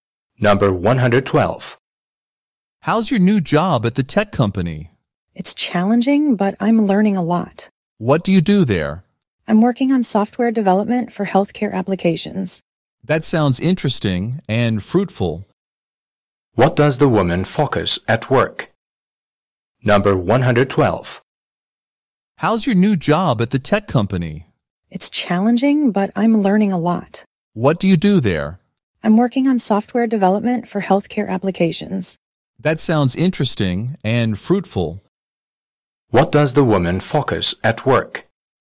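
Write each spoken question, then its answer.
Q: What does the woman focus at work?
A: Software development for healthcare applications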